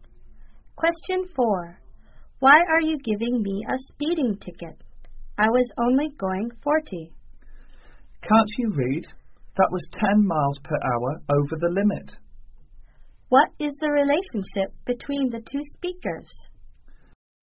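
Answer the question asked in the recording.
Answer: Driver and police officer.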